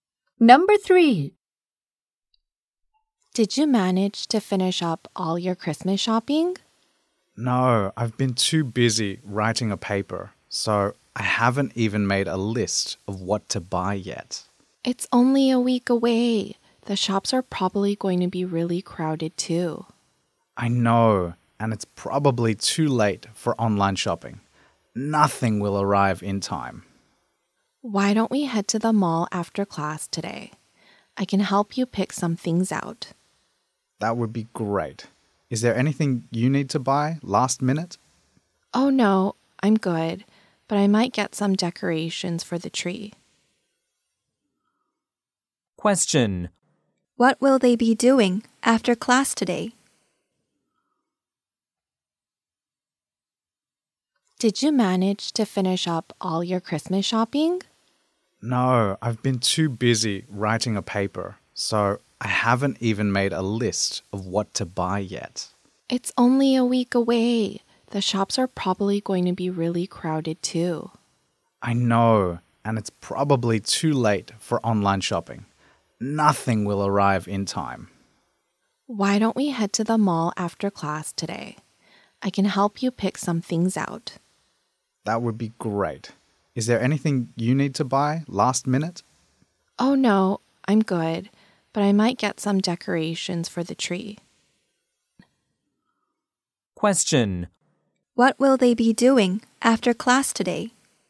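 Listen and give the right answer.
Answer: Going Christmas shopping at the mall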